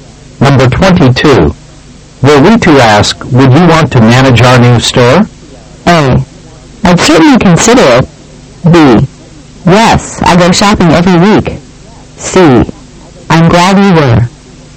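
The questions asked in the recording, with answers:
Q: Were we to ask, would you want to manage our new store?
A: A: I'd certainly consider it.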